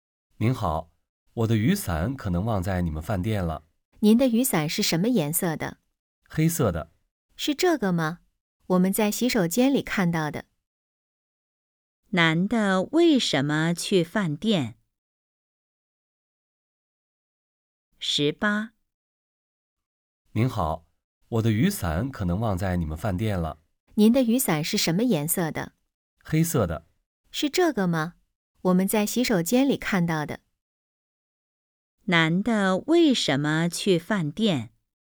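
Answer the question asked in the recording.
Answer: 找忘在饭店的雨伞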